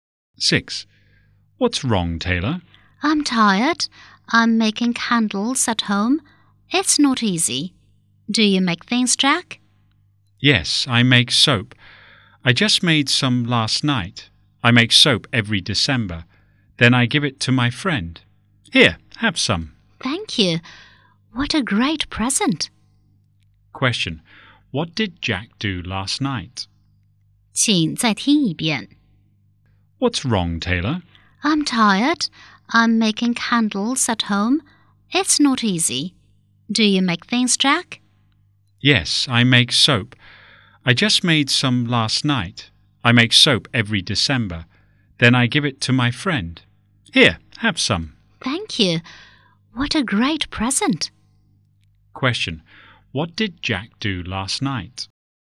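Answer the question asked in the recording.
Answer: He made soap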